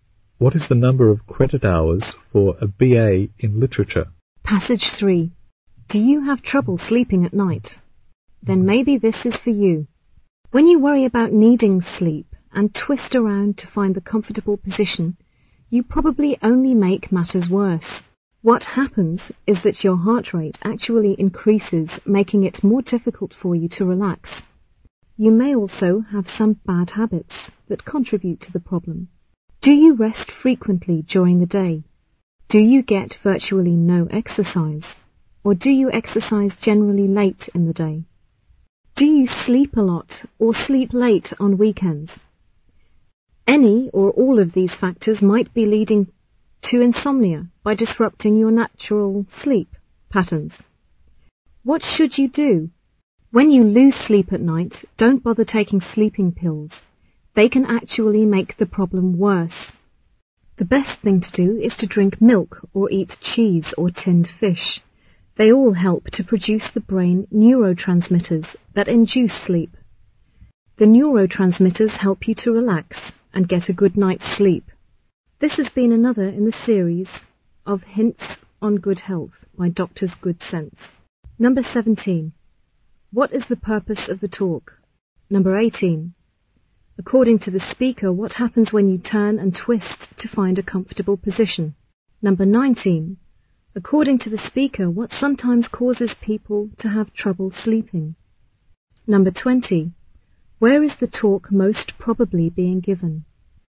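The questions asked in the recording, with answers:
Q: What is the purpose of the talk?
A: To give advice on how to sleep better

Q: According to the speaker, what happens when you turn and twist to find a comfortable position?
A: Your heart rate increases, making it harder to relax

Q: According to the speaker, what sometimes causes people to have trouble sleeping?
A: Bad habits that disrupt natural sleep patterns, like resting often in the day or too little exercise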